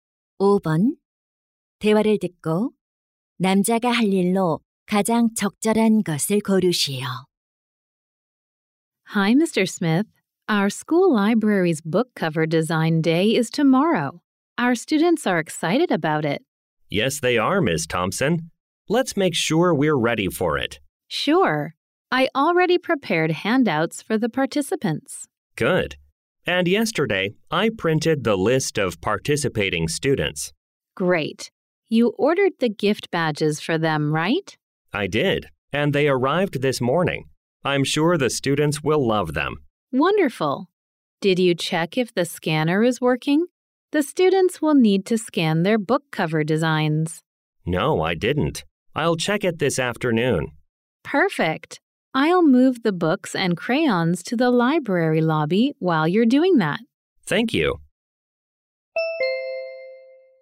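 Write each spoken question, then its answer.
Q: 대화를 듣고 남자가 할 일로 가장 적절한 것을 고르시오.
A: 스캐너 작동 여부 확인하기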